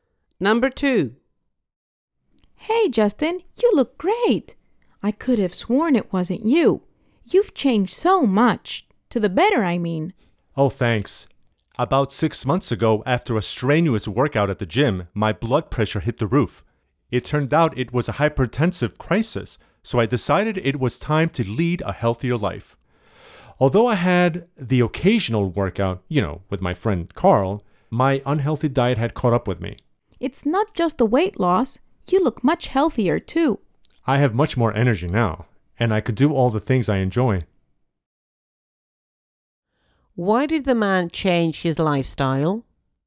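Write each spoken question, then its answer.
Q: Why did the man change his lifestyle?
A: After a workout his blood pressure got dangerously high (a hypertensive crisis)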